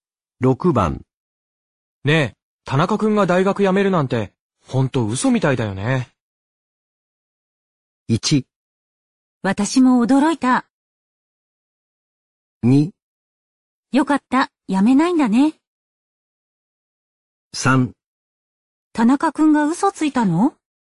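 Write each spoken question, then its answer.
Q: ねえ、田中くんが大学辞めるなんて、ほんと嘘みたいだよね。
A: 1: 私も驚いた。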